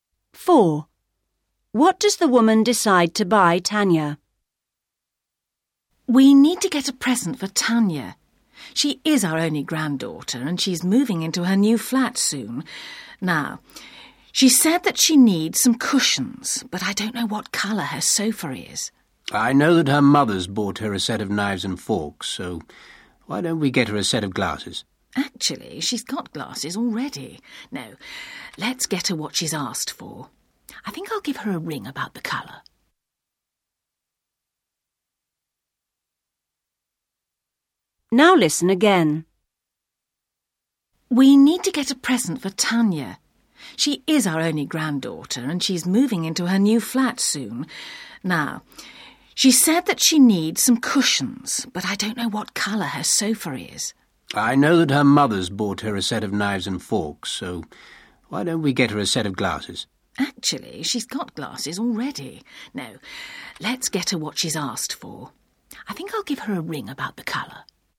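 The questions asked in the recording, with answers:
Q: What does the woman decide to buy Tanya?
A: Cushions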